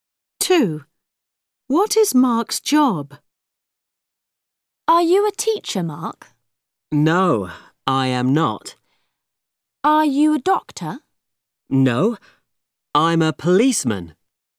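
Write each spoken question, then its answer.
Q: What is Mark's job?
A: a policeman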